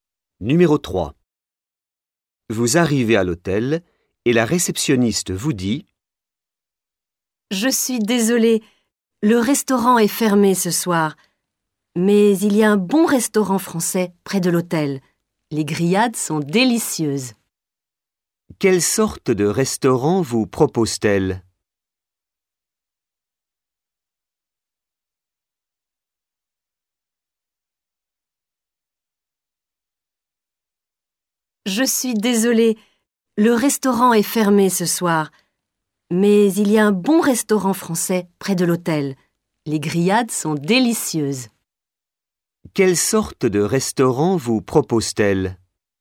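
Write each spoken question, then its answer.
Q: Quelle sorte de restaurant vous propose-t-elle?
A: Un restaurant français (grillades)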